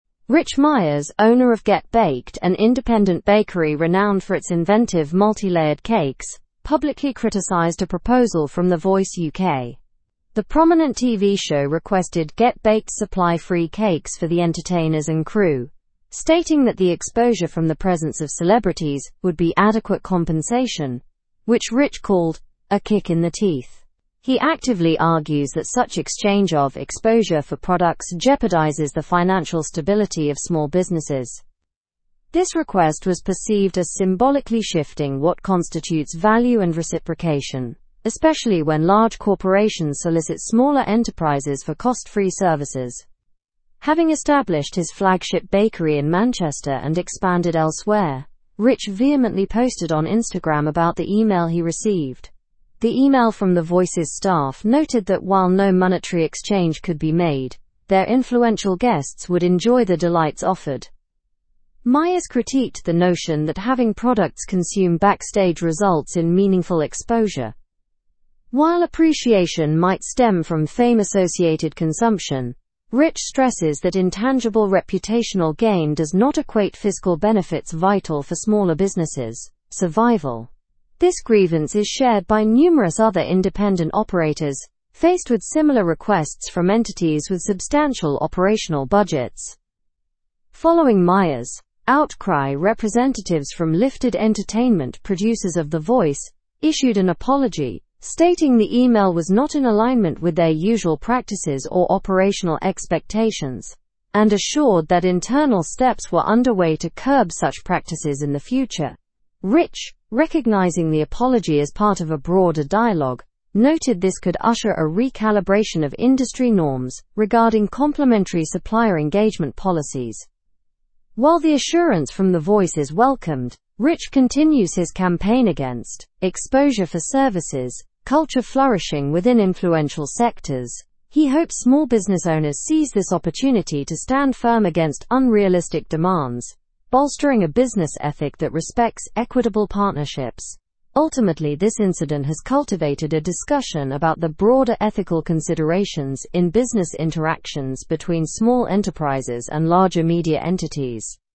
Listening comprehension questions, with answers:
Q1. What proposal did Rich Myers receive from The Voice UK?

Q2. How did Myers react to the proposal from The Voice UK?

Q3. What did the email from The Voice staff say?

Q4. Why does Myers believe that exposure does not equate to business survival?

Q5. How did Lifted Entertainment, the producers of The Voice, respond to Myers' criticism?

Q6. What broader dialogue does Myers believe this issue could initiate?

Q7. What campaign is Rich Myers continuing?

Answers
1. The Voice UK requested that Rich Myers supply free cakes for the entertainers and crew, offering exposure in return.
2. He criticized the request, stating it undermines the financial stability of small businesses.
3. The email noted that no monetary exchange could be made, but influential guests would enjoy the cakes.
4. Because it doesn't provide tangible fiscal benefits necessary for businesses to thrive.
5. They apologized and stated internal measures were being taken to prevent such practices.
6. A discussion on the norms and ethics of supplier engagement policies between small and large enterprises.
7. He's campaigning against the 'exposure for services' culture prevalent in influential sectors.

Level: Level 4